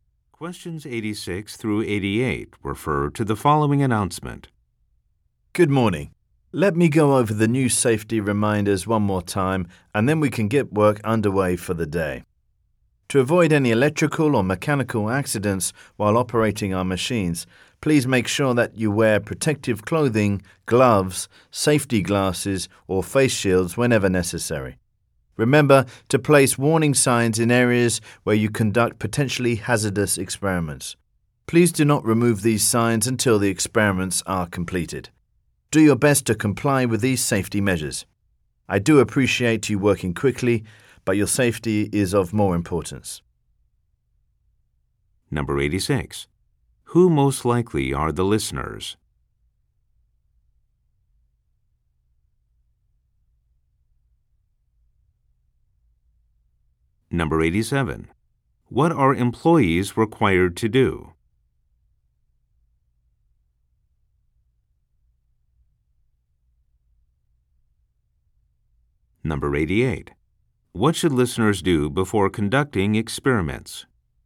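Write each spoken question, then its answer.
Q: What are employees required to do?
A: Wear protective clothing and gear

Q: What should listeners do before conducting experiments?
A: Place warning signs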